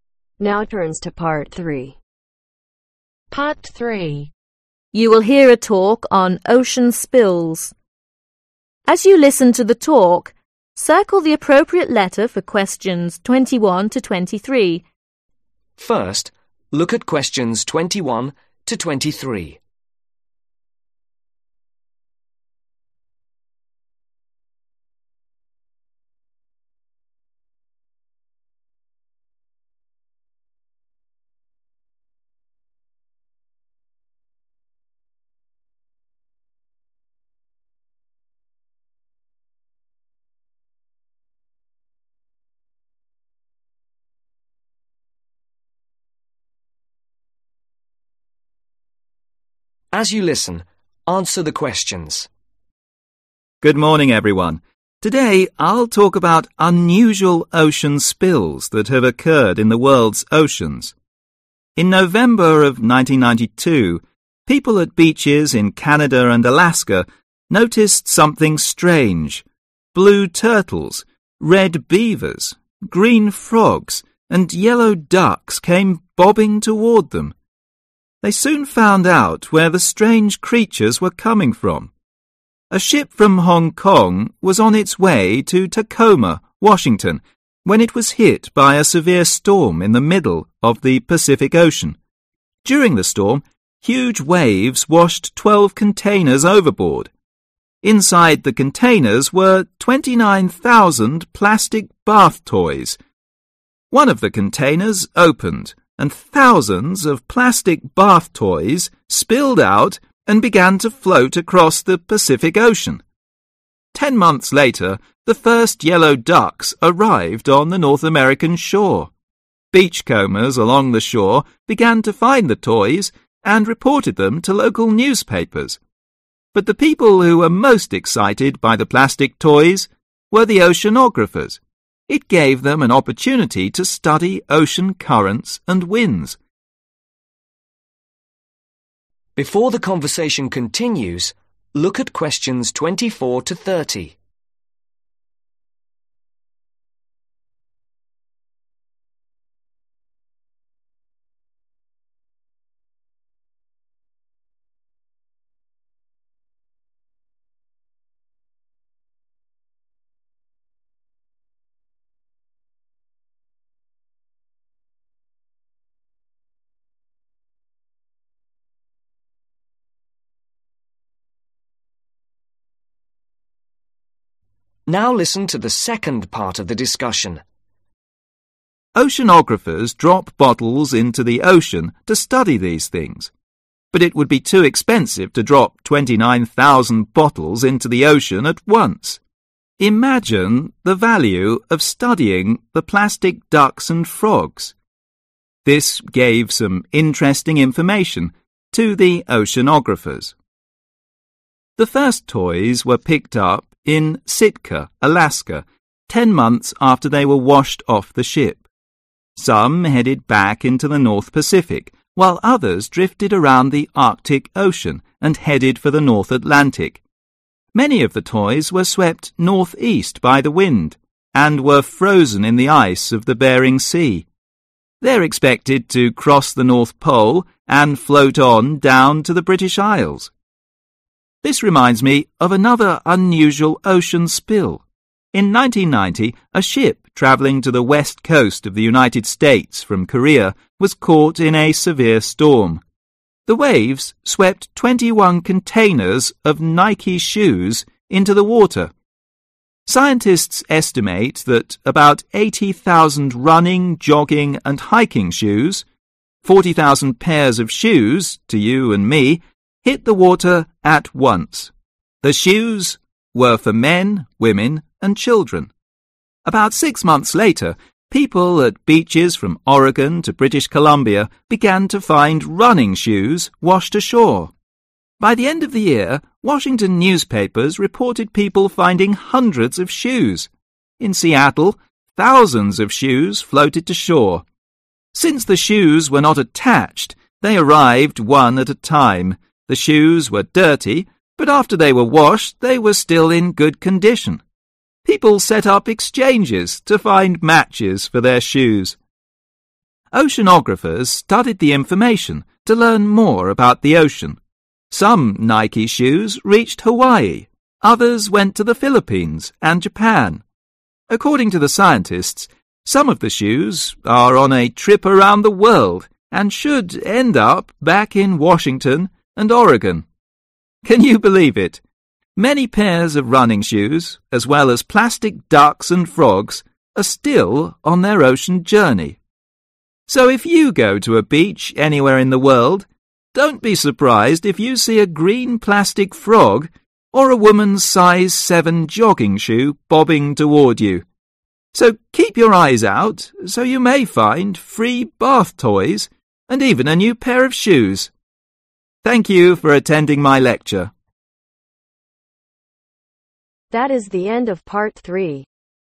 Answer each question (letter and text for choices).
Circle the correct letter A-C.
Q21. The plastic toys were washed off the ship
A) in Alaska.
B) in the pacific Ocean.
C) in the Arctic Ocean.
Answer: B) in the pacific Ocean.

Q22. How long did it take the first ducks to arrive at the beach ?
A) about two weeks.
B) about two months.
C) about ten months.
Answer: C) about ten months.

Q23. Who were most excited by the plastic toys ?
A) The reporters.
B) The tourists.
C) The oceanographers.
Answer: C) The oceanographers.

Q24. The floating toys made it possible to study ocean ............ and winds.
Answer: Currents

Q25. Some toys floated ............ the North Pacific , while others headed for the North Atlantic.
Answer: Back into

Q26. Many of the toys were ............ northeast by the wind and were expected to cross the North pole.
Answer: Swept

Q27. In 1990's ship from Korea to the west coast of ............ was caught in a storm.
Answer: (the) USA

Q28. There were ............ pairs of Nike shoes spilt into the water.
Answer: 40000

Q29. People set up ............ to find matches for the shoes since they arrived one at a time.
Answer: Exchanges

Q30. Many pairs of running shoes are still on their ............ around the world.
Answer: Trip / journey / ocean journey